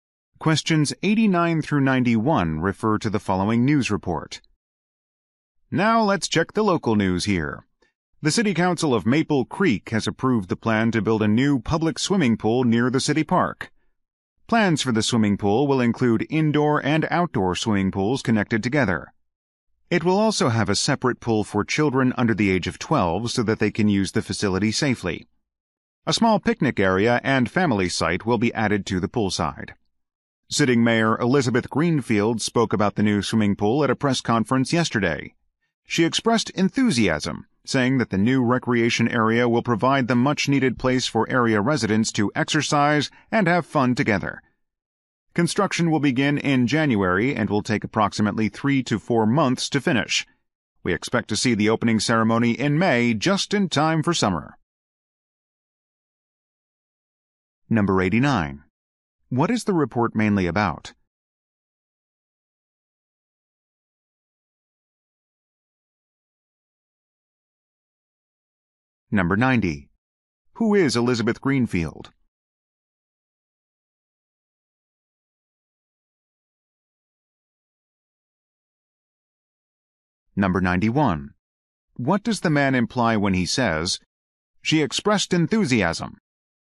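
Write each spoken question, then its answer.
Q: What is the report mainly about?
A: A new public swimming pool

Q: Who is Elizabeth Greenfield?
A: The mayor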